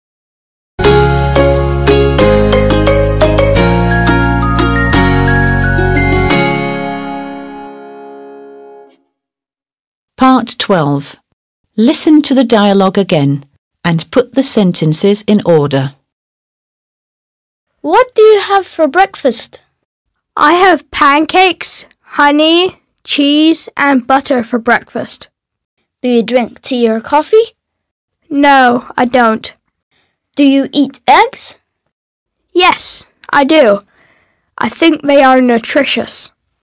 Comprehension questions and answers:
12. Listen to the dialogue again and put the sentences in order.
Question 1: Mark: What do you have for breakfast?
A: 1

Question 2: Luis: I have pancakes, honey, cheese, and butter for breakfast.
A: 2

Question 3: Mark: Do you drink tea or coffee?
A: 3

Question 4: Luis: No, I don't.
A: 4

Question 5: Mark: Do you eat eggs?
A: 5

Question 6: Luis: Yes, I do. I think they are nutritious.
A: 6

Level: 6. Sınıf